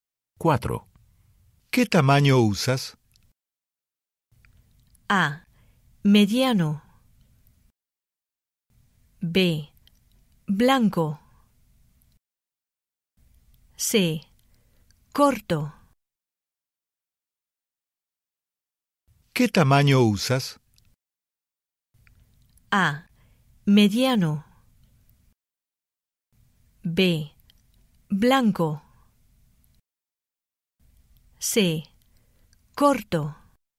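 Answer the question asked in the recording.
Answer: A: Mediano.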